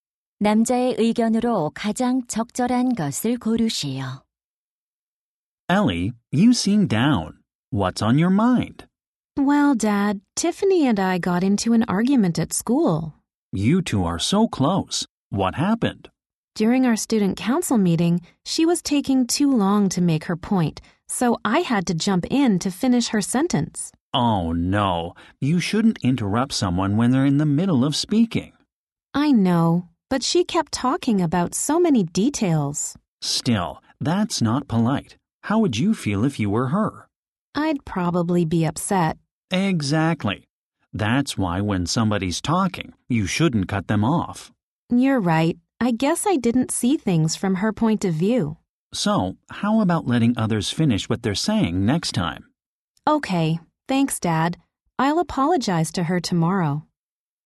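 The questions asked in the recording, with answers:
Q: 대화를 듣고 남자의 의견으로 가장 적절한 것을 고르시오.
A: 다른 사람이 말하는 도중에 말을 끊지 말아야 한다.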